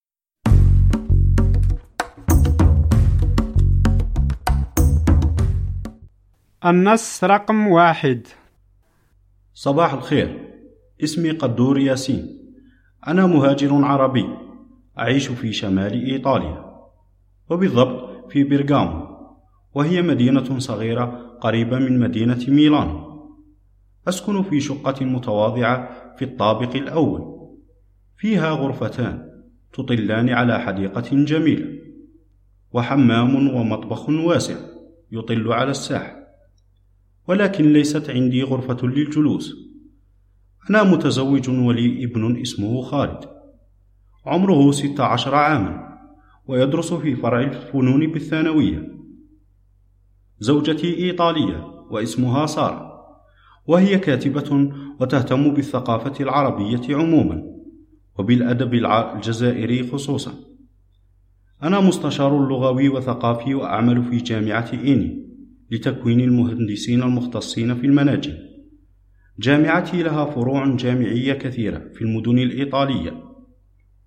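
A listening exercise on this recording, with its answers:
استمعْ / استمعي إلى النص ثم أَكمِل / أكمِلي الجُمَل التالية:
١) قدور مهاجر عربي ________ في شمال ايطاليا و_________ في مدينة بيرجامو.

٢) قدور يعمل كـ _________ لغوي ويسكن في شقّة __________.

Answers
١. يعيش / بالضبط
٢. مستشار / متواضعة

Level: المستوى الأول الدرجة الثانية (A2)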